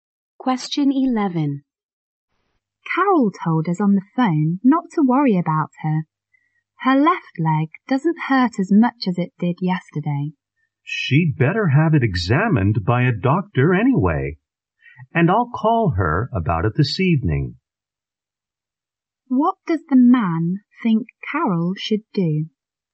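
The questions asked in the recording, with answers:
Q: What does the man think Carol should do?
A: See a doctor about her leg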